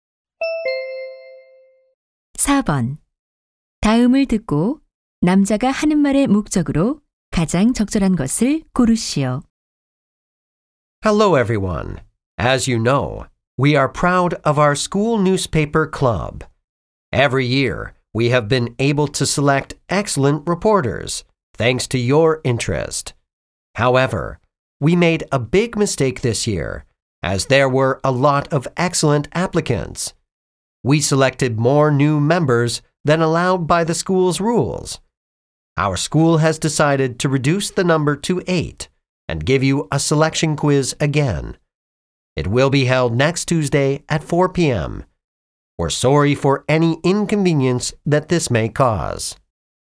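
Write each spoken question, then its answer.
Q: 다음을 듣고 남자가 하는 말의 목적으로 가장 적절한 것을 고르시오.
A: 신문반 신입 회원 선발 시험을 다시 본다는 것을 알리려고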